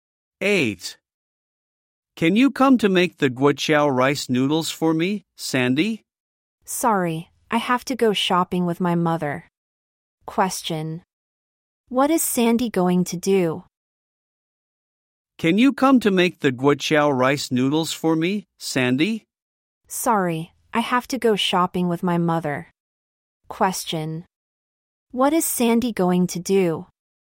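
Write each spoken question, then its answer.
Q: What is Sandy going to do?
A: Go shopping with her mother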